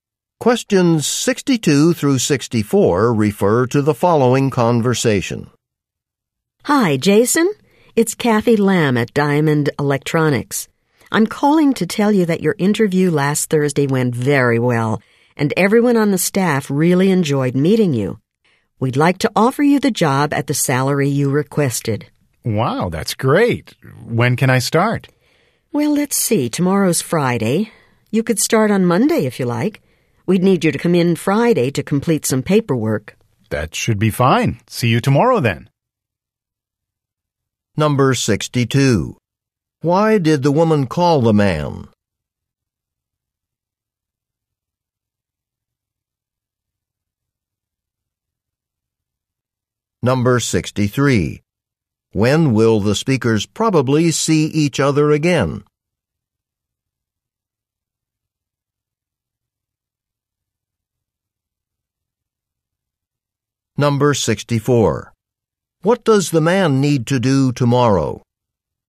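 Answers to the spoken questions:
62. To offer him the job
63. Tomorrow (Friday)
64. Complete some paperwork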